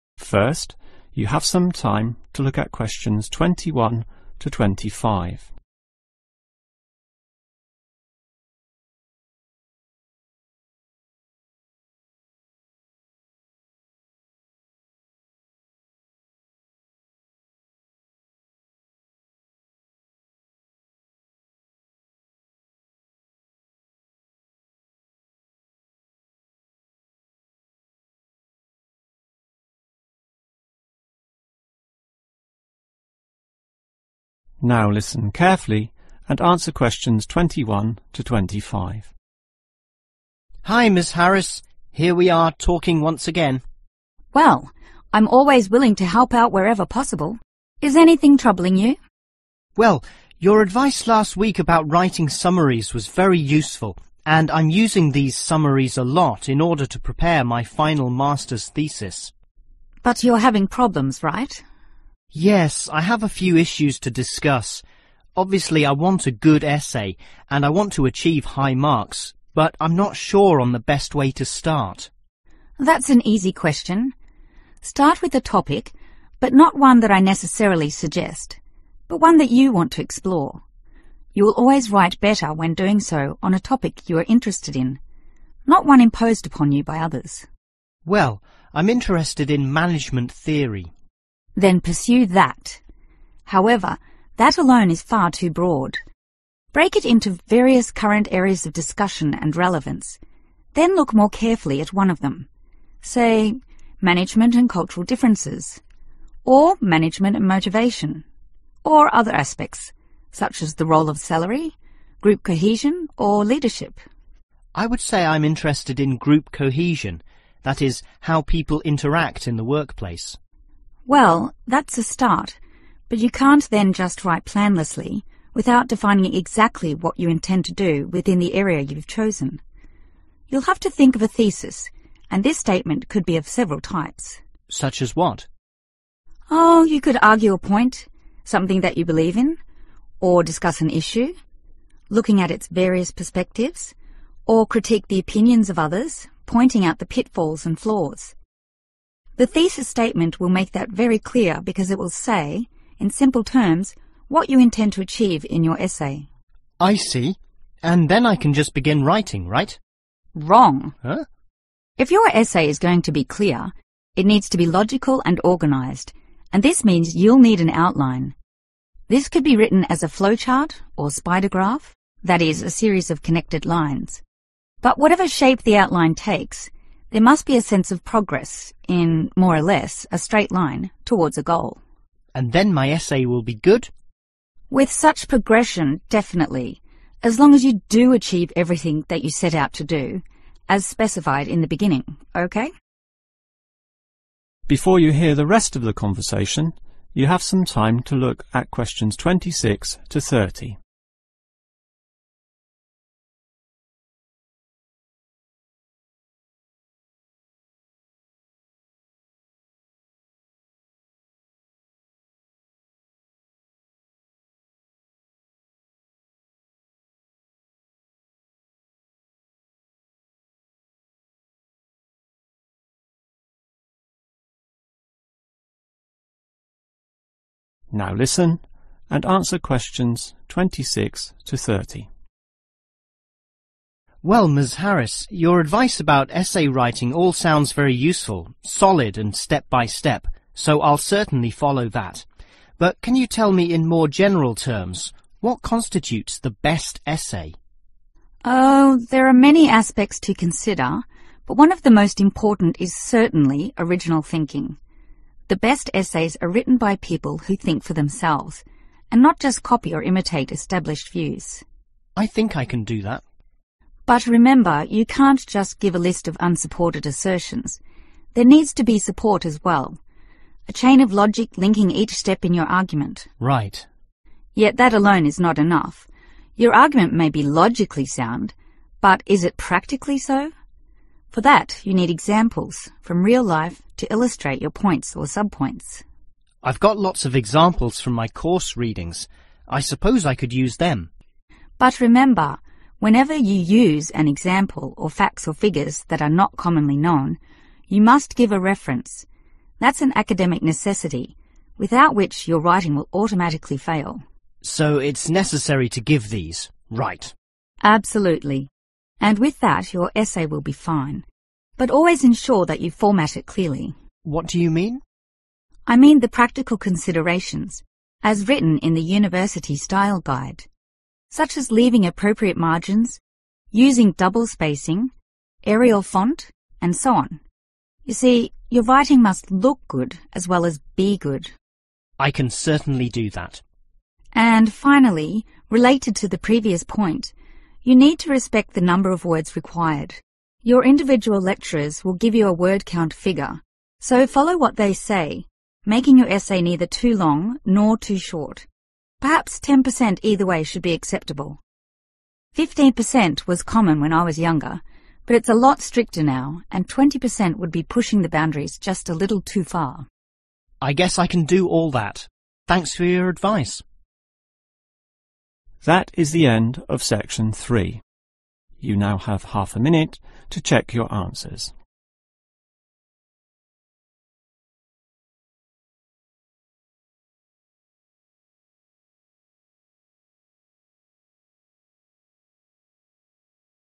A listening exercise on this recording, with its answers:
Complete the flowchart below. Write ONE WORD ONLY for each answer.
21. Decide on 21 ...................... you like.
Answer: topic

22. Focus on 22 ...................... area of interest.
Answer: one

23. Write 23 ...................... statement.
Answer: thesis

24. Create 24 ......................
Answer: outline

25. Ensure this 25 ......................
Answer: progresses

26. There are several 26 ...................... involved in producing a good essay.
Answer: aspects

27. The writer must think independently and give 27 ...................... examples as support,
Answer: real-life

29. The formatting must follow the 29 ...................... issued by the university,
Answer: style guide

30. although it can vary by 30 ......................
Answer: 10%